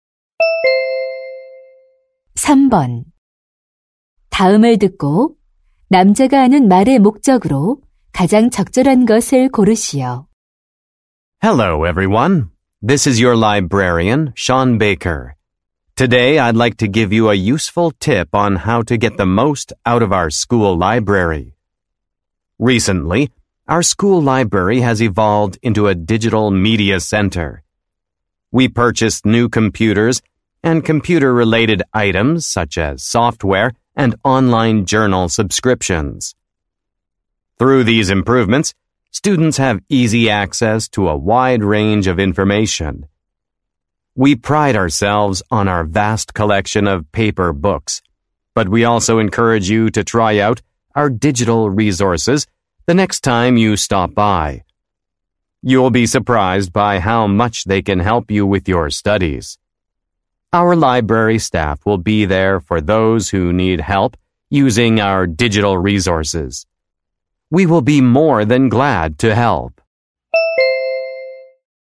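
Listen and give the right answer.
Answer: 학교 도서관의 디지털 자료 이용을 권장하려고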